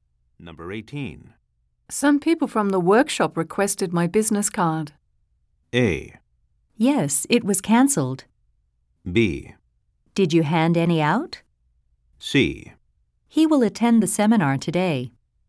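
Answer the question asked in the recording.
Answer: B: Did you hand any out?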